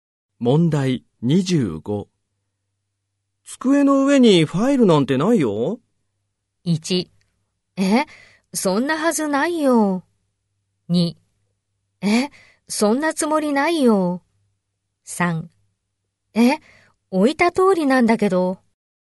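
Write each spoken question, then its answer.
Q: 机の上にファイルなんてないよ。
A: 1: え、そんなはずないよ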